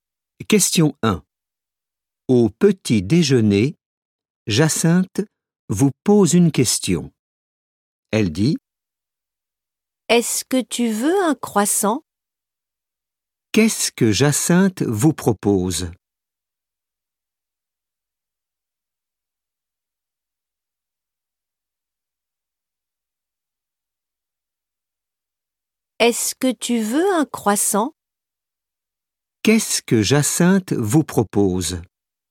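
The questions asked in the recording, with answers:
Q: Qu'est-ce que Jacinthe vous propose ?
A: un croissant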